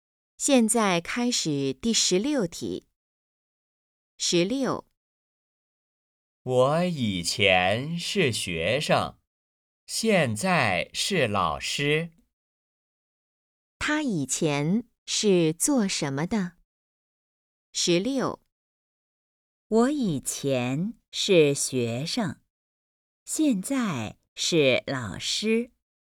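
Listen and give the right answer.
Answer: 学生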